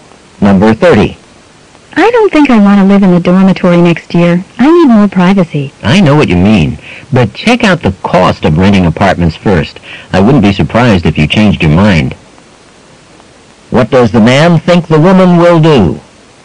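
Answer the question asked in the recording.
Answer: Decide to stay in the dormitory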